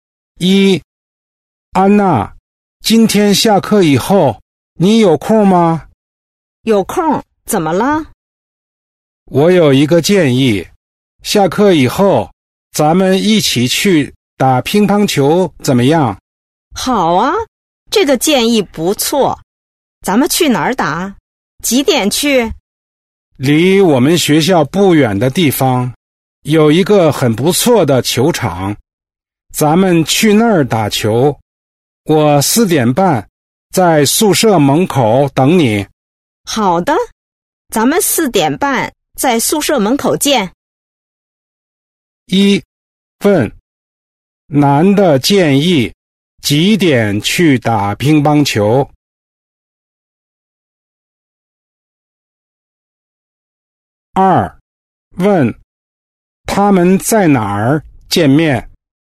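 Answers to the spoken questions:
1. 4:30
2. 宿舍门口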